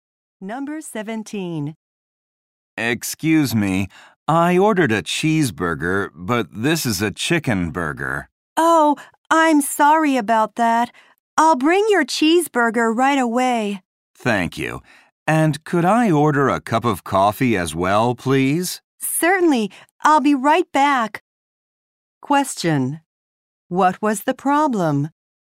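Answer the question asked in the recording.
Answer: The man got the wrong burger.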